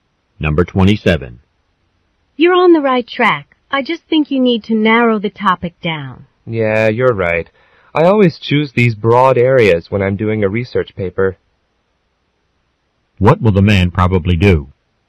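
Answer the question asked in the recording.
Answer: Narrow down his research paper topic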